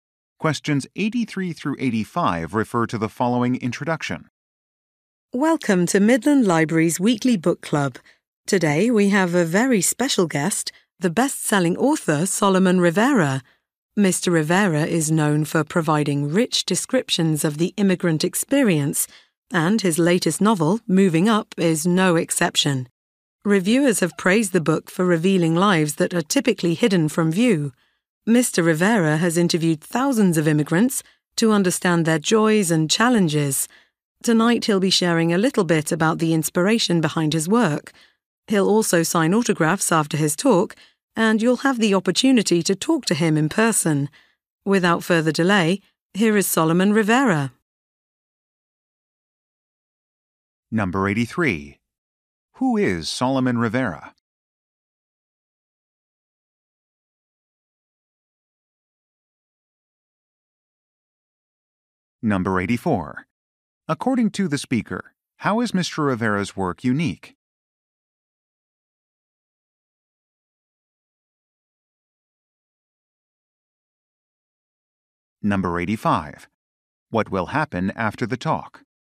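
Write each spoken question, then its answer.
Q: Who is Solomon Rivera?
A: A best-selling author

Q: What will happen after the talk?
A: He will sign autographs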